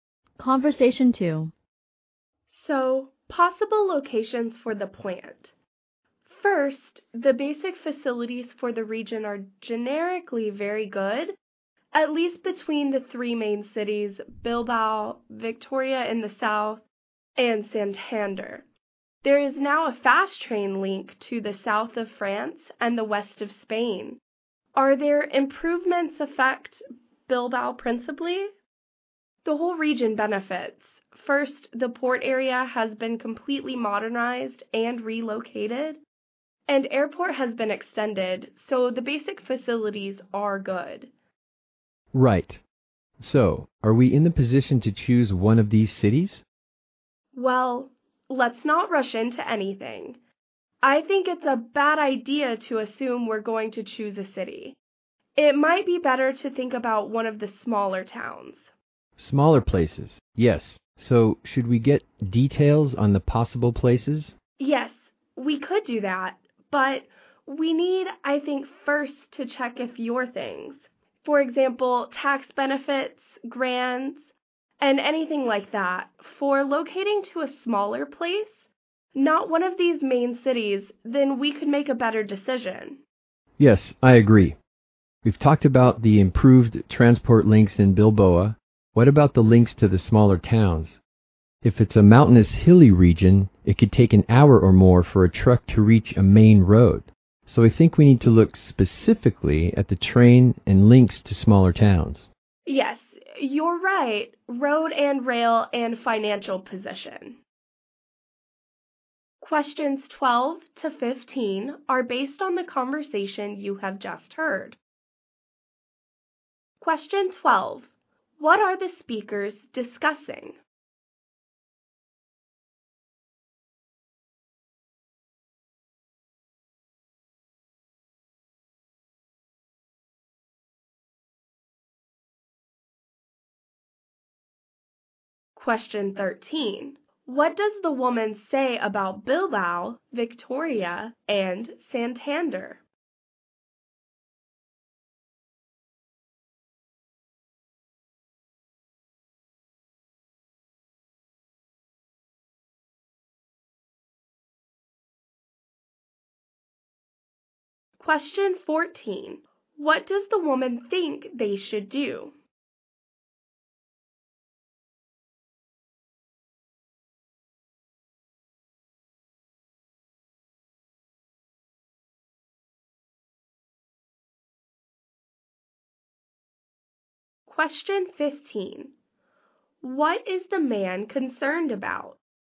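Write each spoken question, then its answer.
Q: What are the speakers discussing?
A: Possible locations for a plant.

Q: What does the woman say about Bilbao, Victoria, and Santander?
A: Their basic facilities are very good.

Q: What does the woman think they should do?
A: Consider smaller towns rather than the main cities.

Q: What is the man concerned about?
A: Transport links to the smaller towns.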